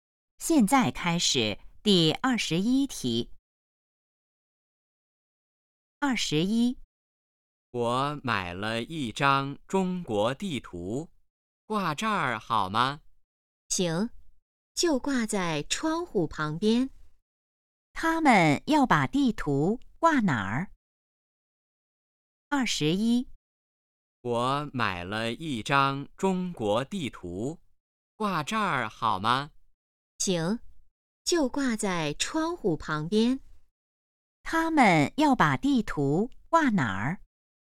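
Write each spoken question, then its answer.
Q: 他们要把地图挂哪儿?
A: 窗户旁边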